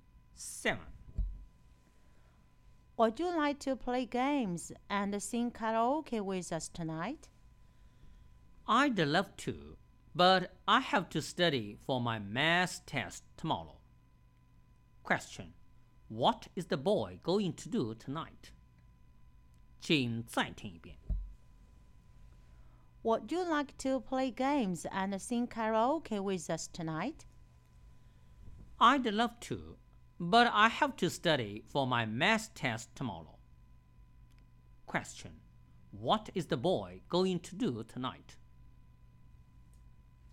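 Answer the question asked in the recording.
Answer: Study for his math test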